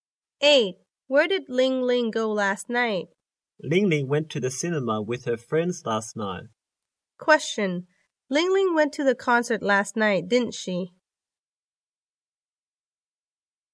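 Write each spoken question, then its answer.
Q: Ling Ling went to the concert last night, didn't she?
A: No, she didn't. She went to the cinema.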